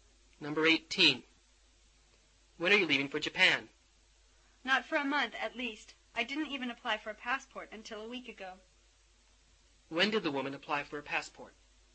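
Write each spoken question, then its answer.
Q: When did the woman apply for a passport?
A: A week ago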